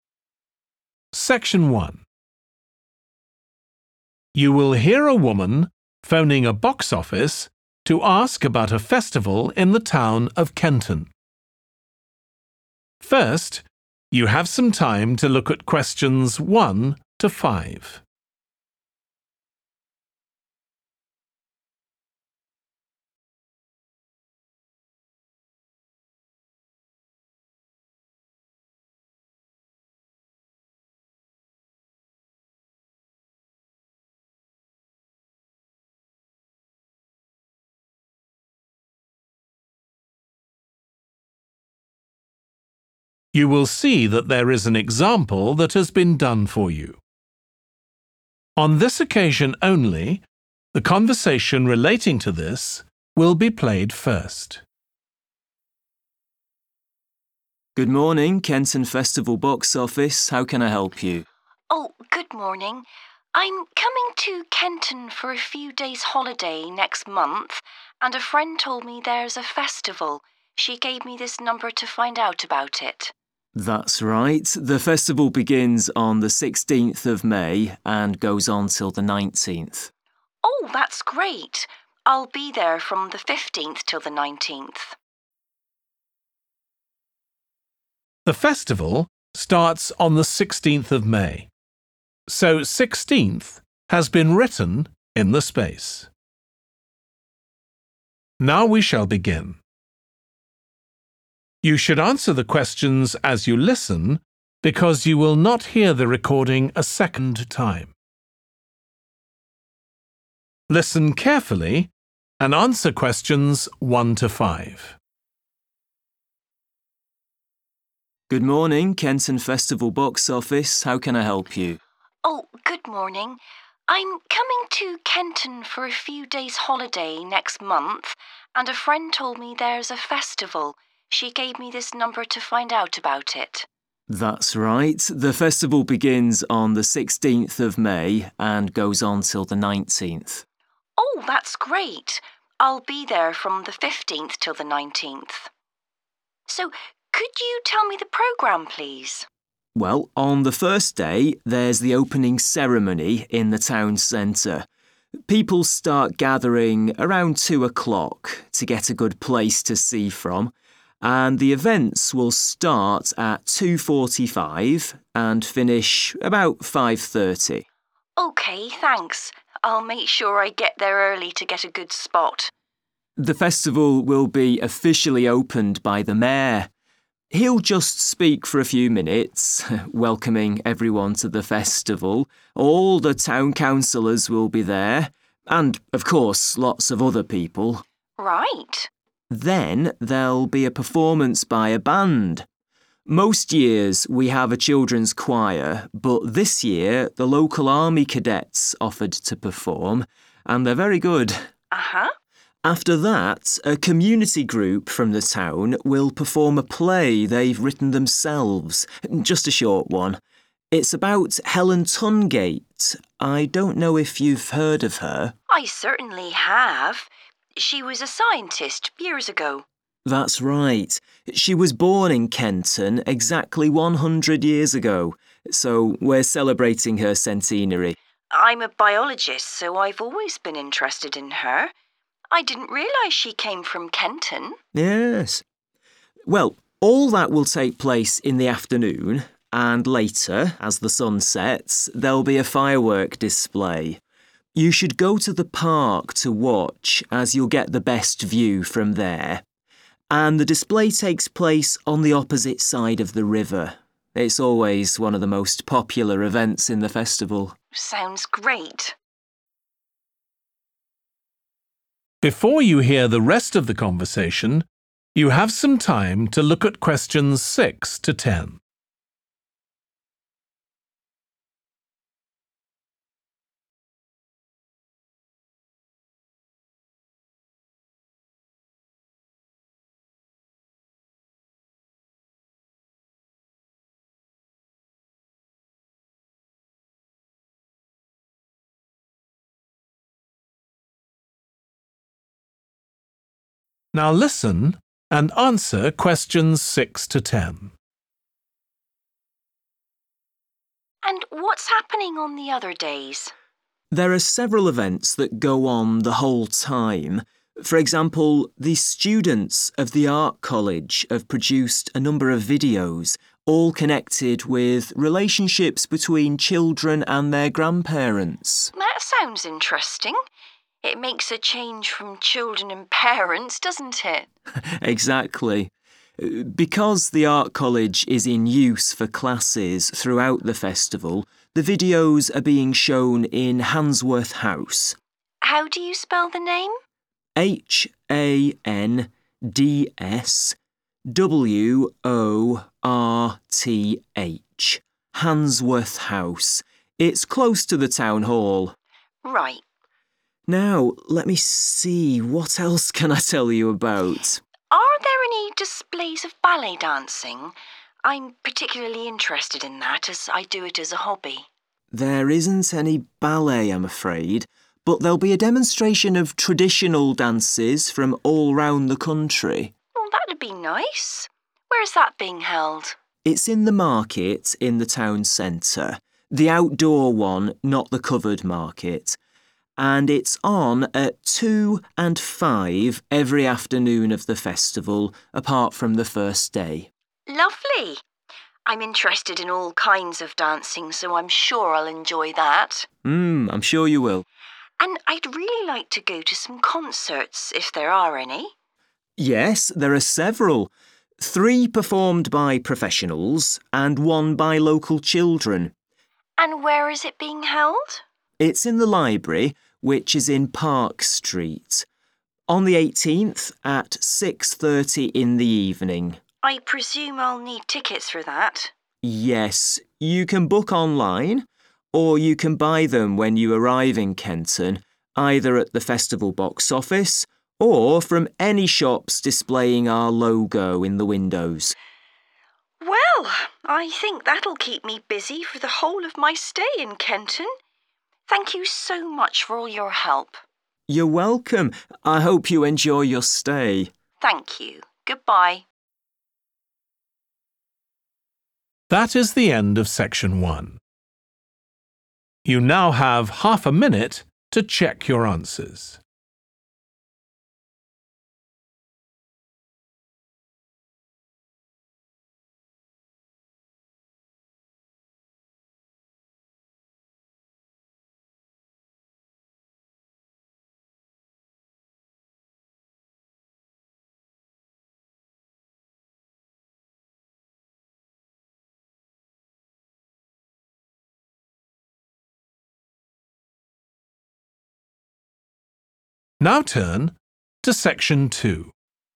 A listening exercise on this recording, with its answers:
Complete the notes below. Write ONE WORD AND/OR A NUMBER for each answer.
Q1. In town centre, starting at 1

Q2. A 2 will perform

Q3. Performance of a 3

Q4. About Helen Tungate (a 4 )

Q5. Evening fireworks display situated across the 5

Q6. Video about relationships that children have with their 6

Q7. Venue: 7 House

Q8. Performance of 8 Dances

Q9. Venue: the 9 market in the town centre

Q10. Tickets available online from festival box office and from shops which have the festival 10 in their windows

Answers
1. 2.45
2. band
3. play
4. scientist
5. river
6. grandparents
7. Handsworth
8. traditional
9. outdoor
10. logo